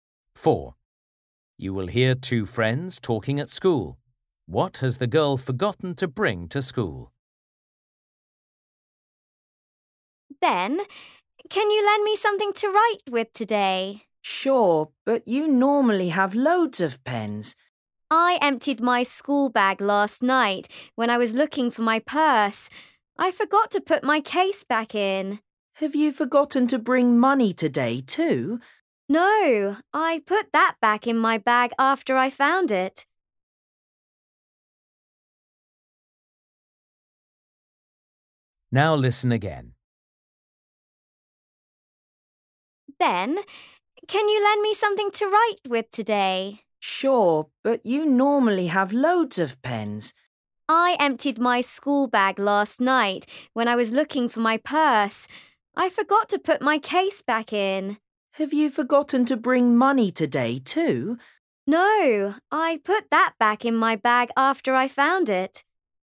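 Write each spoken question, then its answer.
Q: What has the girl forgotten to bring to school?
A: her pencil case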